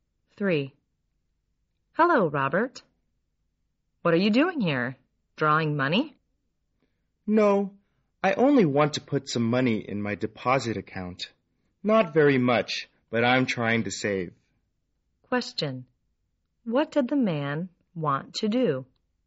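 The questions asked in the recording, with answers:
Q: What did the man want to do?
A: Put some money in his deposit account.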